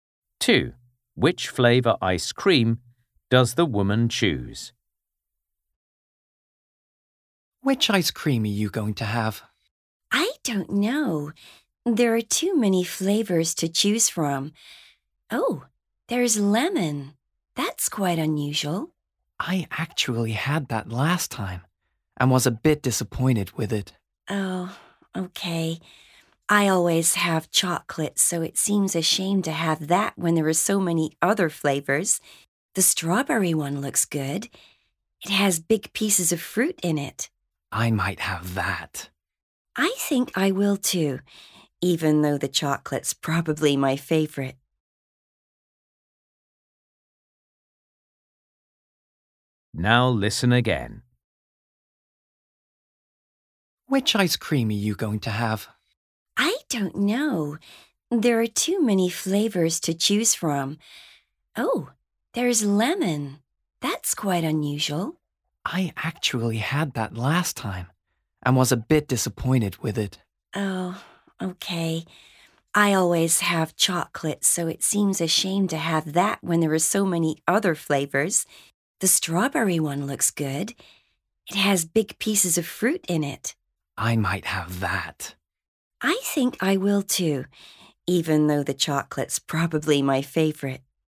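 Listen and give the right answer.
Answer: strawberry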